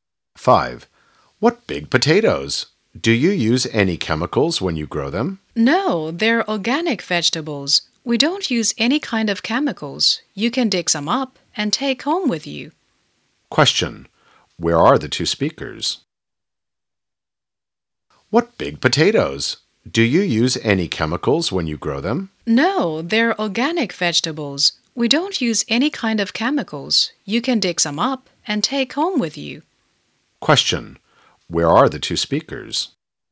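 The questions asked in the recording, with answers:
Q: Where are the two speakers?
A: On a farm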